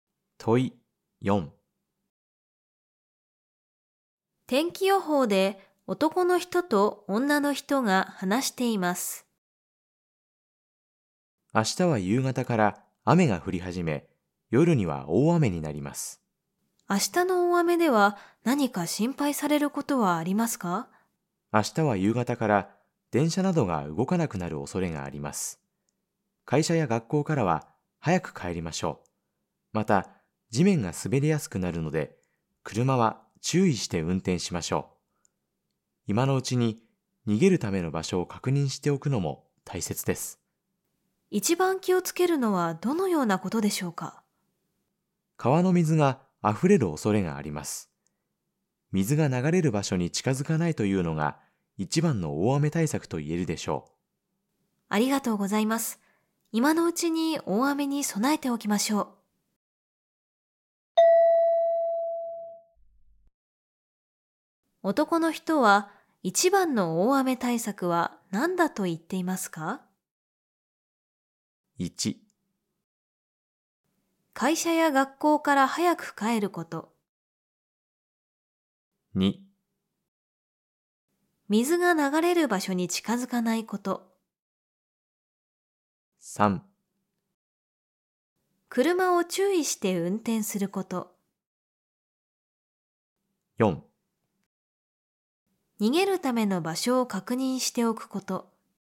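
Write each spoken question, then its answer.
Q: 男の人は一番の大雨対策は何だと言っていますか?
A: 2: 水が流れる場所に近づかないこと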